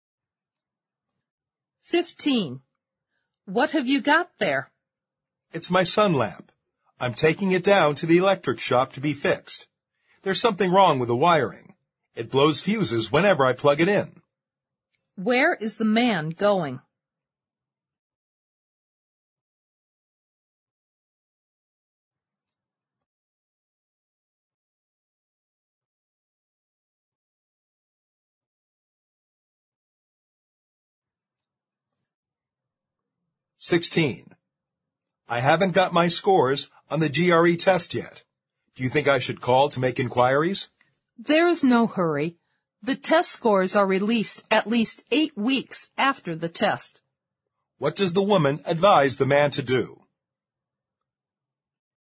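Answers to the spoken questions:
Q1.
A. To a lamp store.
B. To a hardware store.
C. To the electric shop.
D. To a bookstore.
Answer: C. To the electric shop.
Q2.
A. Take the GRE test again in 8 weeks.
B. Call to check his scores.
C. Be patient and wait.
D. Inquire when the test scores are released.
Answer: C. Be patient and wait.

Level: 四级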